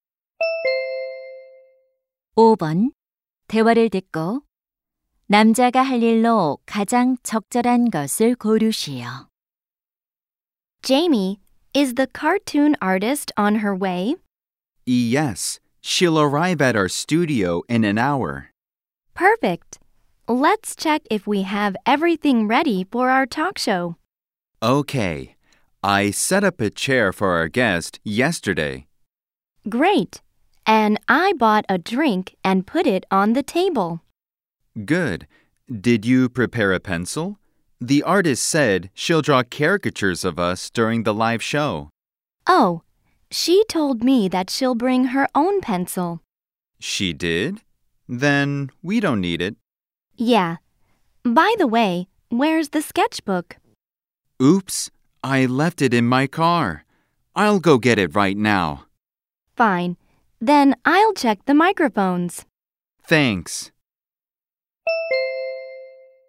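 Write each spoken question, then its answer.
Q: 대화를 듣고 남자가 할 일로 가장 적절한 것을 고르시오.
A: 차에 두고 온 스케치북 가져오기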